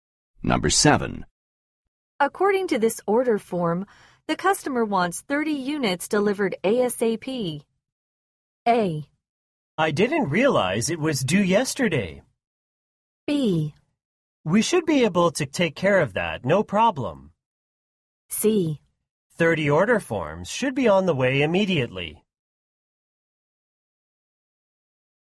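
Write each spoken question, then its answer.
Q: According to this order form, the customer wants 30 units delivered ASAP.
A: B: We should be able to take care of that, no problem.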